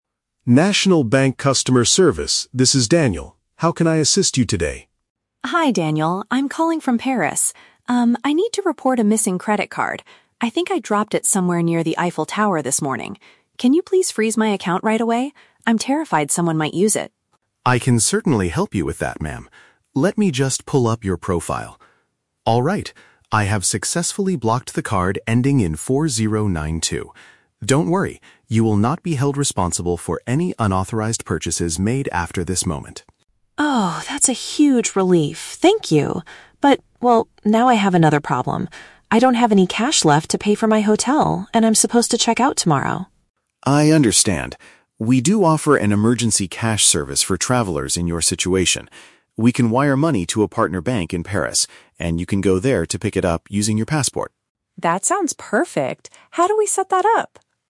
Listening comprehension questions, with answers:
Listen to the telephone conversation between a tourist and a bank operator. Choose the correct answer (A, B, or C) for each question.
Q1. Why is the tourist calling the bank?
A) To report an illegal purchase made on her account.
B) To ask the bank to stop her card from being used.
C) To complain about losing her passport at the Eiffel Tower.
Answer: B) To ask the bank to stop her card from being used.

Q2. What does the operator assure the tourist about?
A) She will get a new card delivered to her hotel tomorrow.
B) She can still use her frozen account to pay for her hotel.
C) She will not have to pay for any illegal transactions from now on.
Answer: C) She will not have to pay for any illegal transactions from now on.

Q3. How will the tourist get money to pay for her accommodation?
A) The bank will send cash to an affiliated bank for her to collect.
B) The operator will unblock her card for one last payment tomorrow.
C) The bank will transfer the money directly to the hotel manager.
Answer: A) The bank will send cash to an affiliated bank for her to collect.

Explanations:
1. The tourist asks the operator to "freeze my account right away." "Freeze an account" means to stop the card from being used. Why the trap is wrong: Option (A) is the trap. The audio mentions "unauthorized purchases", but she is calling to prevent them before they happen, not to report one that already happened. Option (C) is also a trap; she mentions the "Eiffel Tower" and her "passport", but she did not lose her passport.
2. The operator says she "will not be held responsible for any unauthorized purchases." This means she won't have to pay if someone steals and uses her card. Why the trap is wrong: Option (A) is a trap. The audio mentions her "hotel" and "tomorrow", but the operator never promises to deliver a new card there. Option (B) is incorrect because a frozen account cannot be used.
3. The operator offers to "wire money to a partner bank in Paris" so she can "pick it up." "Partner bank" is a synonym for "affiliated bank." Why the trap is wrong: Option (C) is the main trap. The tourist needs to pay the "hotel", but the bank is sending the money to her (via a partner bank), not directly to the hotel manager. Option (B) is a plausible solution in real life but is never mentioned in the audio.

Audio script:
Operator: National Bank Customer Service, this is Daniel. How can I assist you today?
Tourist: Hi Daniel, I'm calling from Paris. Um, I need to report a missing credit card. I think I dropped it somewhere near the Eiffel Tower this morning. Can you please freeze my account right away? I'm terrified someone might use it!
Operator: I can certainly help you with that, ma'am. Let me just pull up your profile. Alright, I have successfully blocked the card ending in 4092. Don't worry, you will not be held responsible for any unauthorized purchases made after this moment.
Tourist: Oh, that's a huge relief. Thank you. But, well, now I have another problem. I don't have any cash left to pay for my hotel, and I'm supposed to check out tomorrow.
Operator: I understand. We do offer an emergency cash service for travelers in your situation. We can wire money to a partner bank in Paris, and you can go there to pick it up using your passport.

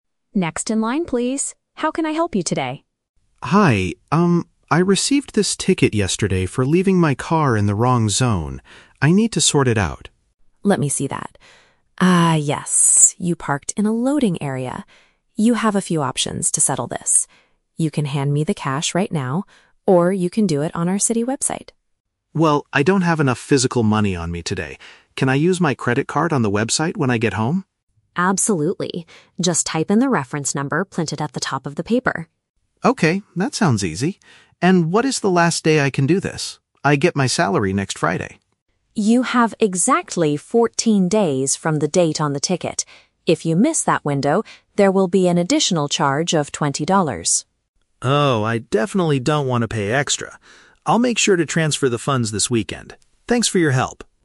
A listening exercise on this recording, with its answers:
Listen to the conversation between a driver and a city clerk. Choose the correct answer (A, B, or C) for each question.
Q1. Why is the driver speaking to the clerk?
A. To ask how to handle a penalty for illegal parking.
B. To report a car that was stolen from a loading area.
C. To pay for his vehicle's annual registration fee.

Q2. How will the driver most likely pay the fine?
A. He will give physical cash to the clerk today.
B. He will mail a paper check to the city office.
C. He will use a bank card on the internet at home.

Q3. What will happen if the driver waits until next month to pay?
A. The police will suspend his driving license.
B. He will have to pay an extra amount of money.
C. He will not be allowed to use the city website.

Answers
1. A. To ask how to handle a penalty for illegal parking.
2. C. He will use a bank card on the internet at home.
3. B. He will have to pay an extra amount of money.

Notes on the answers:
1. The Key: The driver says he got a "ticket... for leaving my car in the wrong zone." A ticket for this reason is a penalty for illegal parking. The Trap (B): The clerk mentions a "loading area" (the wrong zone where he parked), but the driver's car was not stolen. Plausible but not mentioned (C): Paying a vehicle registration fee is a common reason to visit a city office, but they do not talk about this.
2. The Key: The driver asks, "Can I use my credit card on the website when I get home?" and the clerk says "Absolutely." A credit card is a bank card, and the website is on the internet. The Trap (A): The clerk offers the option to pay with "cash right now," but the driver rejects this because he doesn't have "enough physical money" today. Plausible but not mentioned (B): Mailing a check is sometimes an option for paying bills, but it is not mentioned in this conversation.
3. The Key: The clerk says he has "fourteen days" (which is less than a month). If he misses that deadline, there will be an "additional charge of twenty dollars." An additional charge means paying an extra amount of money. The Trap (C): The "website" is mentioned as a way to pay, but the clerk does not say the driver will be blocked from using it if he is late. Plausible but not mentioned (A): Losing a driving license can happen for very serious traffic crimes, but the clerk does not threaten him with this.

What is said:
Clerk: Next in line, please. How can I help you today?
Driver: Hi, um, I received this ticket yesterday for leaving my car in the wrong zone. I need to sort it out.
Clerk: Let me see that. You parked in a loading area. You have a few options to settle this. You can hand me the cash right now, or you can do it on our city website.
Driver: Well, I don't have enough physical money on me today. Can I use my credit card on the website when I get home?
Clerk: Absolutely. Just type in the reference number printed at the top of the paper.
Driver: Okay, that sounds easy. And what is the last day I can do this? I get my salary next Friday.
Clerk: You have exactly fourteen days from the date on the ticket. If you miss that window, there will be an additional charge of twenty dollars.
Driver: Oh, I definitely don't want to pay extra. I'll make sure to transfer the funds this weekend. Thanks for your help.

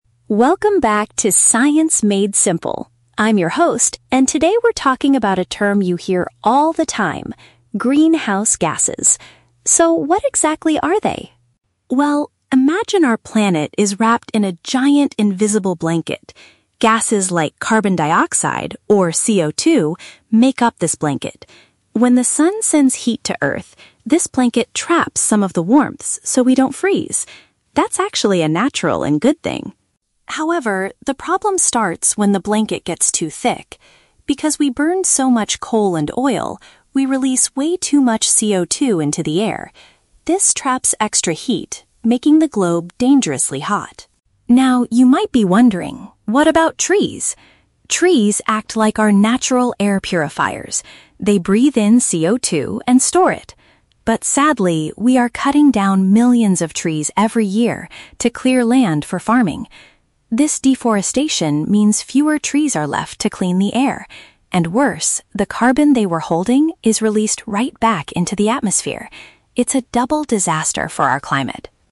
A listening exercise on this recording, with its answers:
Listen to a science podcast about greenhouse gases and choose the correct answer (A, B, or C) for each question.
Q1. What is the original, natural function of the "invisible blanket" around the Earth?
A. To prevent the planet from becoming too cold.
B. To block dangerous sunlight from hitting the ground.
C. To produce extra heat for plants to grow.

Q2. Why is the Earth currently getting dangerously hot?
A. Because the sun is sending more heat than it used to in the past.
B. Because the invisible blanket around the planet has slowly disappeared.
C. Because humans are producing excessive amounts of carbon dioxide.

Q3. According to the host, how does cutting down trees make climate change worse?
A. It destroys the natural habitats of many wild forest animals.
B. It stops the forests from absorbing harmful gases from the air.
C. It requires the use of heavy machines that burn a lot of oil.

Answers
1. A. To prevent the planet from becoming too cold.
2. C. Because humans are producing excessive amounts of carbon dioxide.
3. B. It stops the forests from absorbing harmful gases from the air.

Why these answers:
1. The host says the blanket "traps some of the warmth so we don't freeze." (Paraphrasing: prevent from becoming too cold = so we don't freeze). Why the trap is wrong: Option (B) is a trap. In real life, the ozone layer blocks dangerous sunlight, but this is an outside fact not mentioned in the audio. Option (C) is a trap that mixes up the literal concept of a garden greenhouse with the audio's explanation.
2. The host explains that because we burn coal and oil, "we release way too much CO2 into the air." (Paraphrasing: producing excessive amounts = release way too much). Why the trap is wrong: Option (B) is the trap. The audio explicitly states that the blanket "gets too thick," not that it has disappeared. Option (A) is unmentioned.
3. The host explains that trees act as "air purifiers" and breathe in CO2, but deforestation means "fewer trees are left to clean the air." (Paraphrasing: stops from absorbing harmful gases = fewer trees left to clean the air). Why the trap is wrong: Option (A) is a very strong real-world trap. Destroying animal habitats is a major consequence of deforestation, but the host only talks about the impact on the air/climate. Option (C) is a trap because "burn oil" is mentioned earlier in the audio, but not as the reason why cutting down trees is bad.

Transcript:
Host: Welcome back to "Science Made Simple". I'm your host, and today we're talking about a term you hear all the time: greenhouse gases. So, what exactly are they?
Well, imagine our planet is wrapped in a giant, invisible blanket. Gases like carbon dioxide, or CO2, make up this blanket. When the sun sends heat to Earth, this blanket traps some of the warmth so we don't freeze. That's actually a natural and good thing.
However, the problem starts when the blanket gets too thick. Because we burn so much coal and oil, we release way too much CO2 into the air. This traps extra heat, making the globe dangerously hot.
Now, you might be wondering, what about trees? Trees act like our natural air purifiers. They breathe in CO2 and store it. But sadly, we are cutting down millions of trees every year to clear land for farming. This deforestation means fewer trees are left to clean the air, and worse, the carbon they were holding is released right back into the atmosphere. It's a double disaster for our climate.

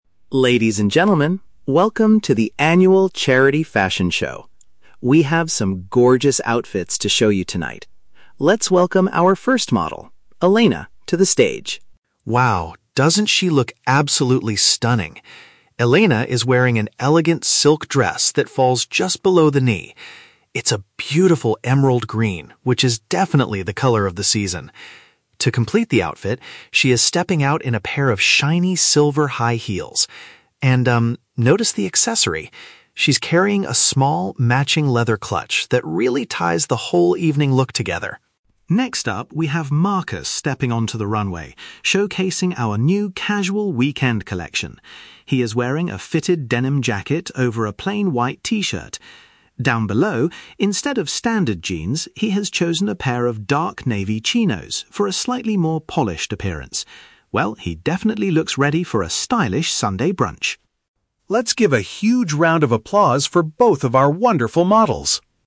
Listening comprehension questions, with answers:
Listen to the MC's commentary at the fashion show. For each question, choose the correct answer (A, B, or C).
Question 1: How would you describe Elena's footwear?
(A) They are made of dark green leather.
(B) They are bright, metallic, and tall.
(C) They are flat and comfortable for walking.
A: (B) They are bright, metallic, and tall.

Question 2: What type of trousers is Marcus currently wearing on the runway?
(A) Standard blue denim jeans.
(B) Dark blue casual trousers.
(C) Formal black suit pants.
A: (B) Dark blue casual trousers.

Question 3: What kind of occasion is Marcus's outfit most suitable for?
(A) A formal evening party or dinner.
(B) A relaxed daytime outing on the weekend.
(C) A professional meeting at the office.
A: (B) A relaxed daytime outing on the weekend.

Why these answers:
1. The MC says Elena is wearing "shiny silver high heels." "Shiny silver" is paraphrased as "bright, metallic," and "high" means "tall." Option A is a trap because the MC mentions "green" for her dress and "leather" for her clutch bag, not her shoes. Option C is plausible for footwear but contradicts the fact that she is wearing high heels.
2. The MC states that Marcus is wearing "dark navy chinos" (navy is a dark blue color, and chinos are a type of casual trousers). Option A is the trap; the MC explicitly says he is wearing chinos "instead of standard jeans." Option C is a trap because while chinos give a "polished appearance," they are not formal suit pants.
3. The MC says Marcus is showcasing the "casual weekend collection" and looks ready for a "Sunday brunch." This is paraphrased as a "relaxed daytime outing on the weekend." Option A is a trap because the formal "evening look" belongs to the first model, Elena. Option C is plausible for some clothing, but his outfit (denim jacket and t-shirt) is not for a professional meeting.

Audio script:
MC: Ladies and gentlemen, welcome to the Annual Charity Fashion Show! We have some gorgeous outfits to show you tonight. Let's welcome our first model, Elena, to the stage.
Wow, doesn't she look absolutely stunning? Elena is wearing an elegant silk dress that falls just below the knee. It's a beautiful emerald green, which is definitely the color of the season. To complete the outfit, she is stepping out in a pair of shiny silver high heels. And, um, notice the accessory—she's carrying a small, matching leather clutch that really ties the whole evening look together.
Next up, we have Marcus stepping onto the runway, showcasing our new casual weekend collection. He is wearing a fitted denim jacket over a plain white t-shirt. Down below, instead of standard jeans, he has chosen a pair of dark navy chinos for a slightly more polished appearance. Well, he definitely looks ready for a stylish Sunday brunch!

